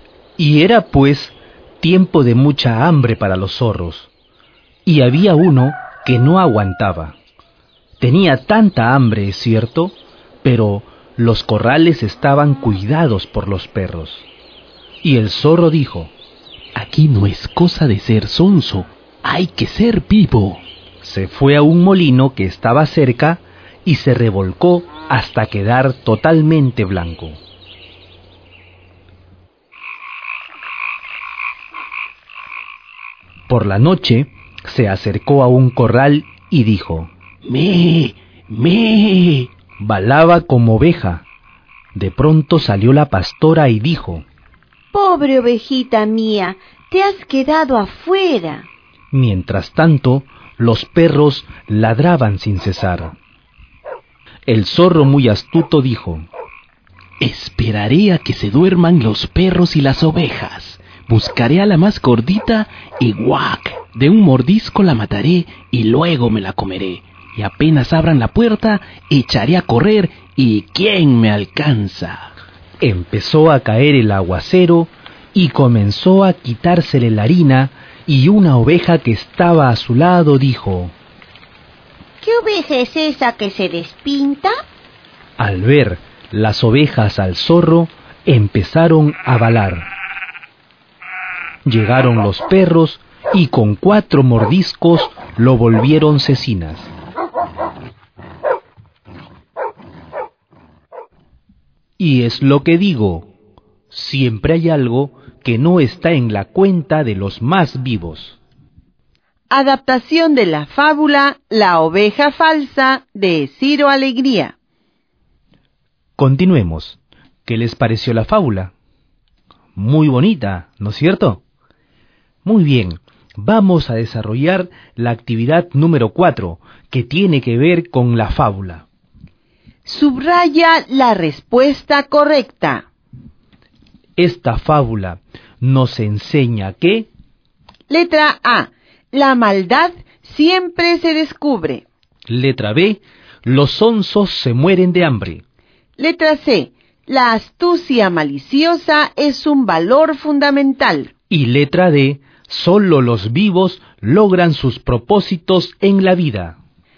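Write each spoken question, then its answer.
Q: Esta fábula nos enseña que...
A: A: La maldad siempre se descubre.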